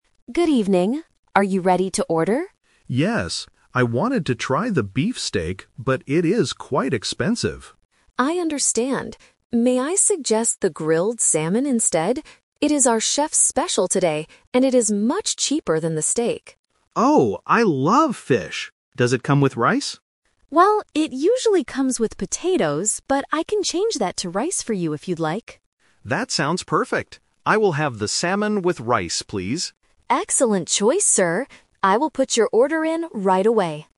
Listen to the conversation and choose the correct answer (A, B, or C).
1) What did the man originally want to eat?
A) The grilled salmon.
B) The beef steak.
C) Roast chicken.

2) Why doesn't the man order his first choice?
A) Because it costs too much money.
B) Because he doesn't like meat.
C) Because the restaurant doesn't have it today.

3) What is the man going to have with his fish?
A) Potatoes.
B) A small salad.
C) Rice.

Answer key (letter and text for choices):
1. B) The beef steak.
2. A) Because it costs too much money.
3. C) Rice.

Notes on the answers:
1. The customer says, "I wanted to try the beef steak". Option A is the Trap (it is what he decides to eat at the end, not his original choice). Option C is a plausible food item but is never mentioned.
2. He says the steak is "quite expensive" (which means it costs too much money). Option B is not mentioned (he actually wanted the steak initially). Option C is a Trap for common restaurant listening scenarios, but the waiter never says they are sold out.
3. This is the second Twist. The waiter says the fish usually comes with potatoes, but the customer asks for rice, and they agree on it. Option A is the Trap (the original side dish). Option B is not mentioned in the audio.

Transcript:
Waiter: Good evening. Are you ready to order?
Customer: Yes. I wanted to try the beef steak, but it is quite expensive.
Waiter: I understand. May I suggest the grilled salmon instead? It is our chef's special today, and it is much cheaper than the steak.
Customer: Oh, I love fish! Does it come with rice?
Waiter: Well, it usually comes with potatoes, but I can change that to rice for you if you'd like.
Customer: That sounds perfect. I will have the salmon with rice, please.